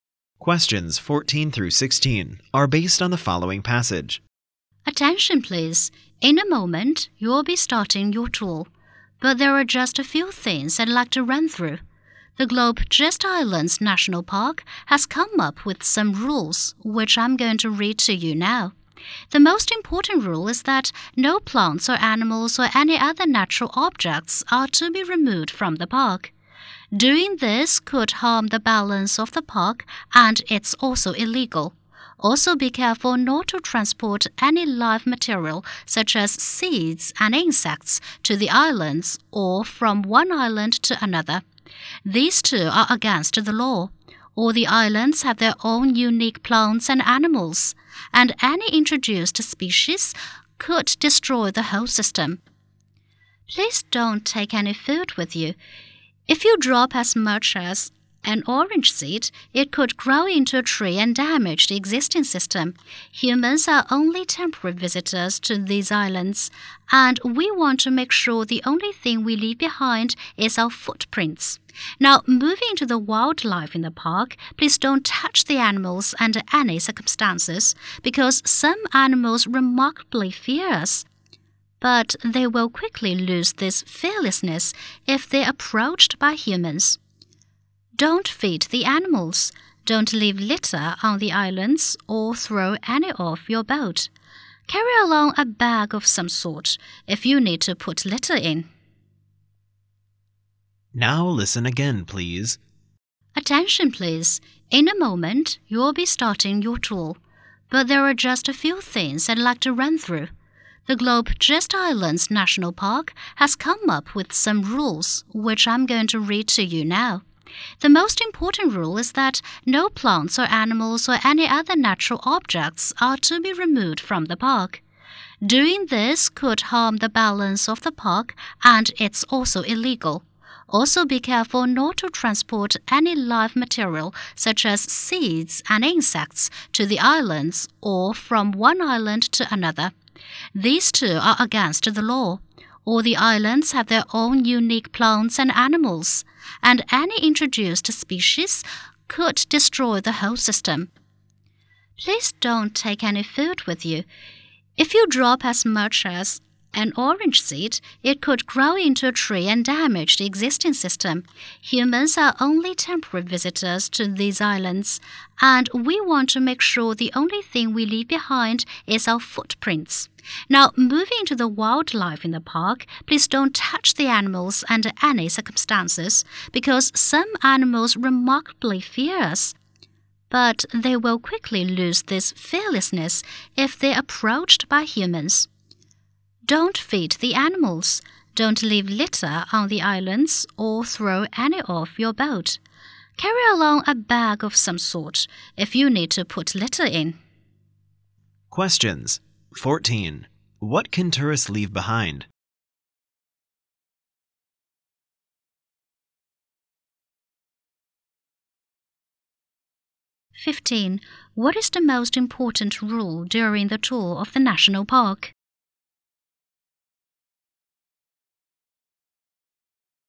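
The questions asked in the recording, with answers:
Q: What can tourists leave behind?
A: Only their footprints

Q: What is the most important rule during the tour of the national park?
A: No plants, animals or natural objects may be removed from the park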